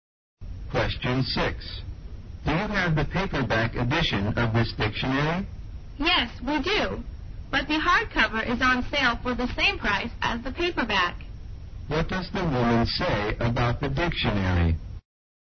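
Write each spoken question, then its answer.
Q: What does the woman say about the dictionary?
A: The hardcover is on sale for the same price as the paperback.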